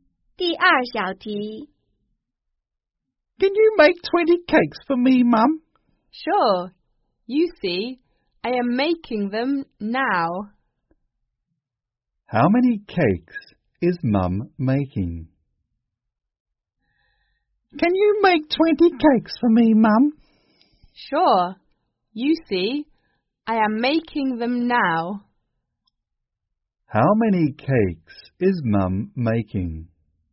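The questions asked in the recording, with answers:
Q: How many cakes is Mum making?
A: 20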